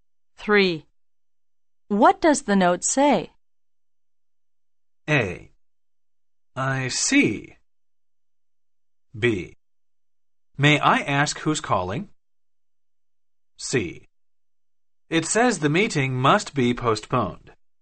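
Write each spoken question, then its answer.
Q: What does the note say?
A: C: It says the meeting must be postponed.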